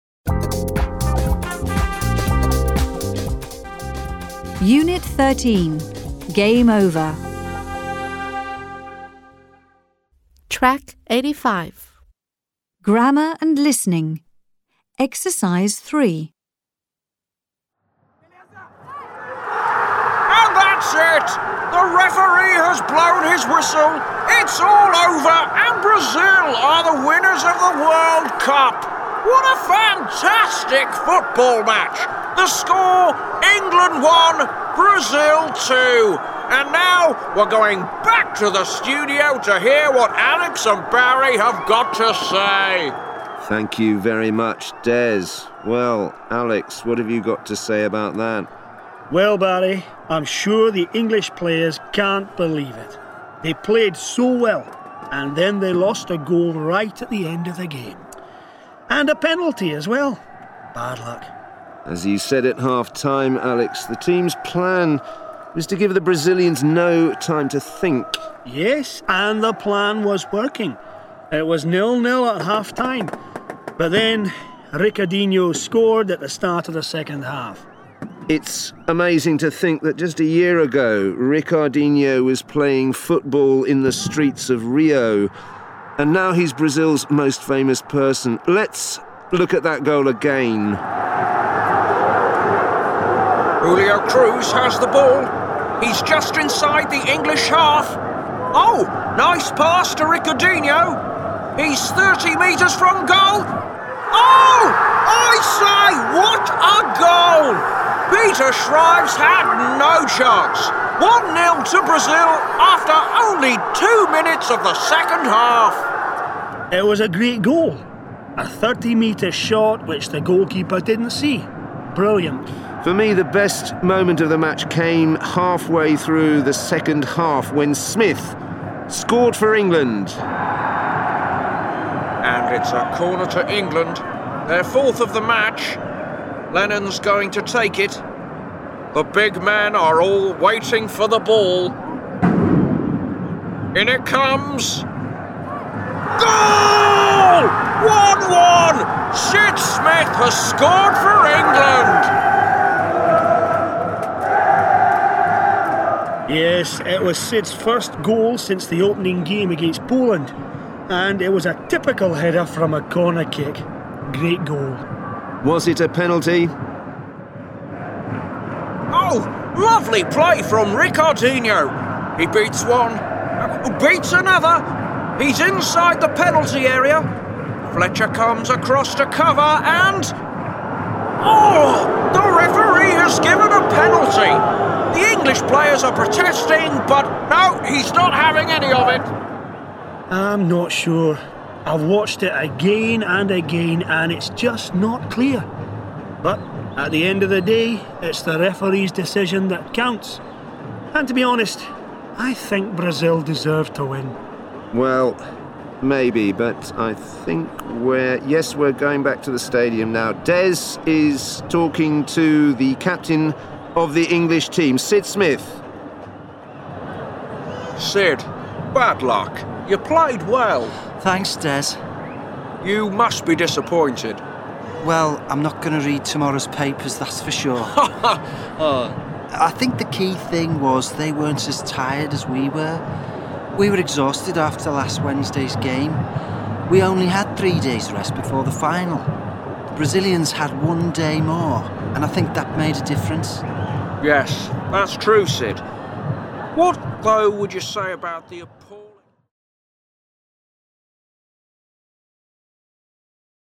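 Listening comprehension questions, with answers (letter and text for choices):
Listen to the audio clip about a football match and complete the following statistics.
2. ● Half-time score: Brazil (1) England (2)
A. Sid Smith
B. 1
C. 0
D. 2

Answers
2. C. 0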